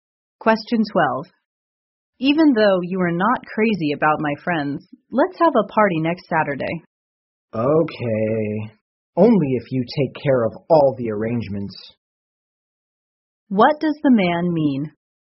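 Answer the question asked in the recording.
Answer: He will agree to the party only if the woman makes all the arrangements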